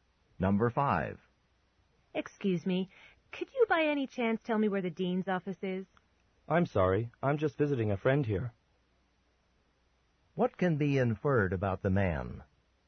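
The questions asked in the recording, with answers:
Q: What can be inferred about the man?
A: He doesn't know where the dean's office is because he's just visiting.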